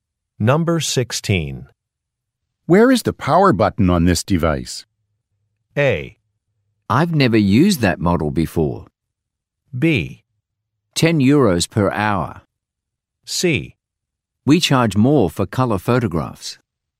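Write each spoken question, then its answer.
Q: Where is the power button on this device?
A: A: I've never used that model before.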